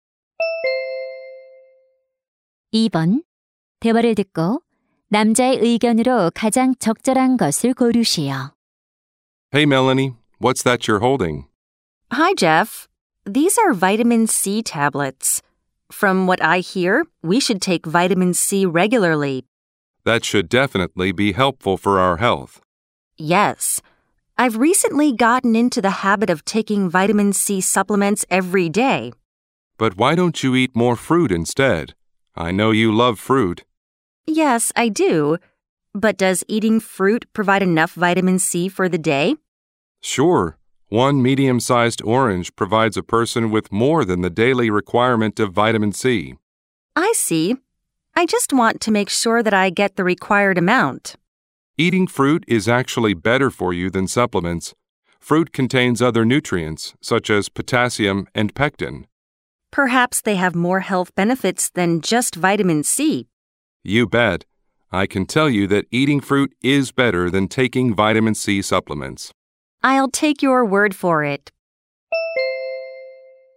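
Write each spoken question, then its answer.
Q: 대화를 듣고 남자의 의견으로 가장 적절한 것을 고르시오.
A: 비타민C 보충제보다 과일을 먹는 것이 건강에 더 좋다.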